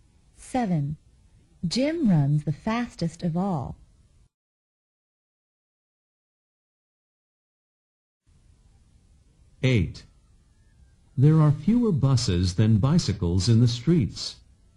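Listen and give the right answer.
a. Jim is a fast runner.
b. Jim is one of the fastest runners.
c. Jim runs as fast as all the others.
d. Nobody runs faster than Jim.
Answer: d. Nobody runs faster than Jim.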